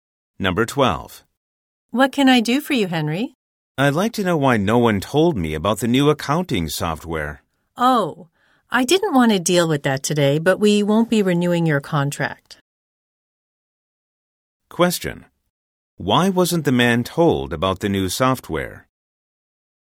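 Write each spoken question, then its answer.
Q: Why wasn't the man told about the new software?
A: His contract will not be renewed.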